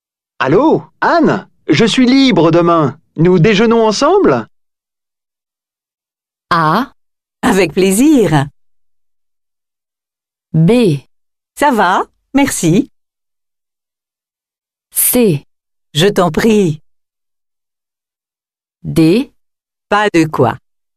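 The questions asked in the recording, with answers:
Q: Allô, Anne, je suis libre demain. Nous déjeunons ensemble?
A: A: Avec plaisir.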